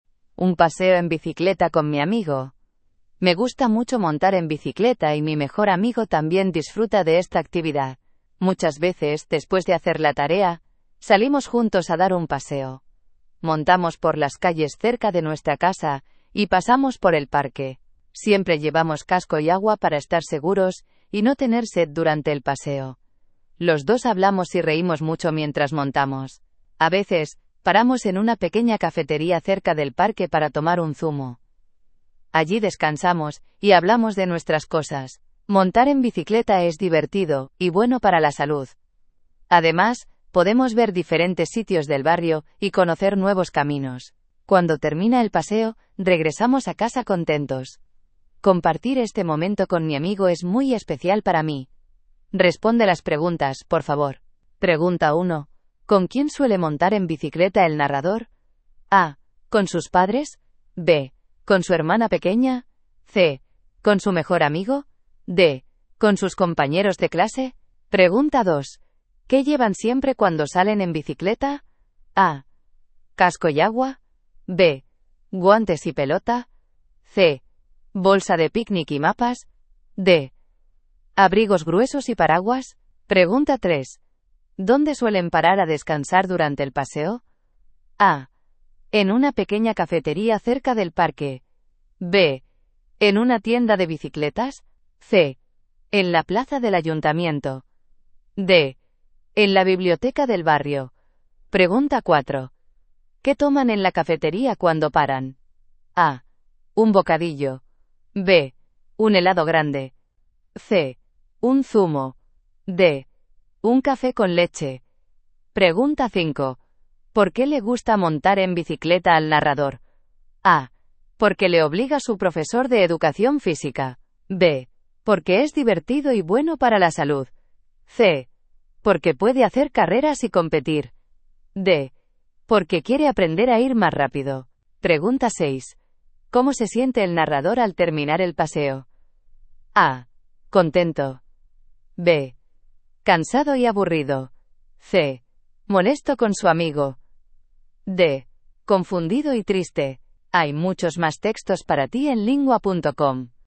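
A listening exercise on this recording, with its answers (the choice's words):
Dann beantworte die folgenden Fragen zum Text:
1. ¿Con quién suele montar en bicicleta el narrador?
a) Con sus padres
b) Con su hermana pequeña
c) Con su mejor amigo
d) Con sus compañeros de clase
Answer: Con su mejor amigo

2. ¿Qué llevan siempre cuando salen en bicicleta?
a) Casco y agua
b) Guantes y pelota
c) Bolsa de picnic y mapas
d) Abrigos gruesos y paraguas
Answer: Casco y agua

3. ¿Dónde suelen parar a descansar durante el paseo?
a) En una pequeña cafetería cerca del parque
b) En una tienda de bicicletas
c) En la plaza del ayuntamiento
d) En la biblioteca del barrio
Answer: En una pequeña cafetería cerca del parque

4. ¿Qué toman en la cafetería cuando paran?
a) Un bocadillo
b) Un helado grande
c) Un zumo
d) Un café con leche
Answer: Un zumo

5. ¿Por qué le gusta montar en bicicleta al narrador?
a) Porque le obliga su profesor de educación física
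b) Porque es divertido y bueno para la salud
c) Porque puede hacer carreras y competir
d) Porque quiere aprender a ir más rápido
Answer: Porque es divertido y bueno para la salud

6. ¿Cómo se siente el narrador al terminar el paseo?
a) Contento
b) Cansado y aburrido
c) Molesto con su amigo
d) Confundido y triste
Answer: Contento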